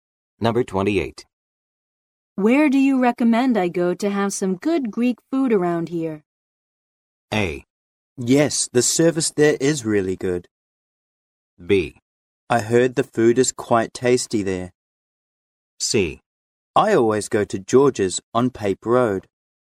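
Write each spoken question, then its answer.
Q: Where do you recommend I go to have some good Greek food around here?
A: C: I always go to George's on Pape Road.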